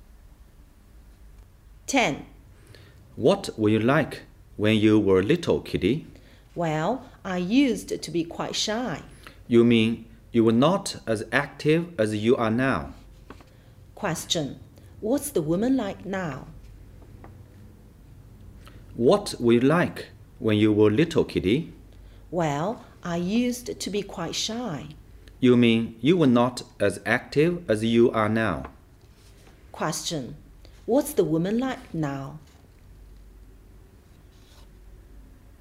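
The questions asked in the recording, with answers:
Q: What's the woman like now?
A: Active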